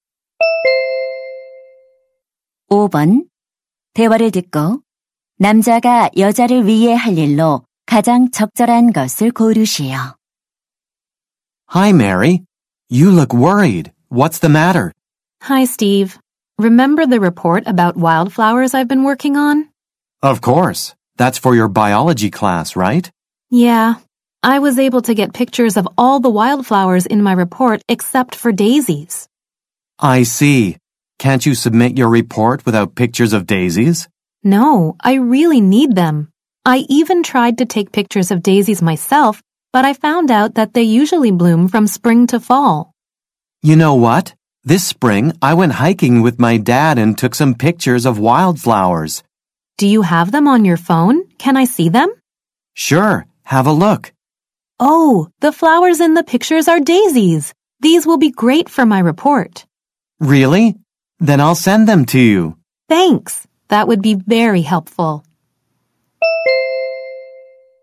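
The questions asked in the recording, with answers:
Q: 대화를 듣고 남자가 여자를 위해 할 일로 가장 적절한 것을 고르시오.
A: 데이지 사진 보내 주기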